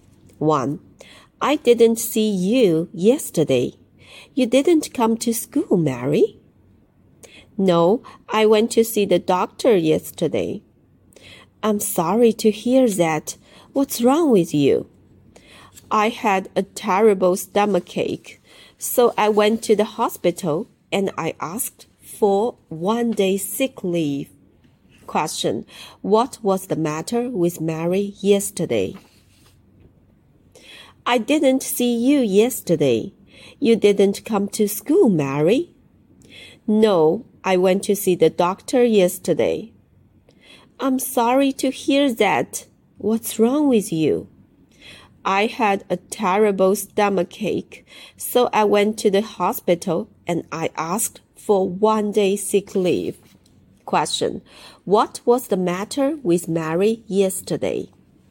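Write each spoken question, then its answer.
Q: What was the matter with Mary yesterday?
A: She had a terrible stomachache.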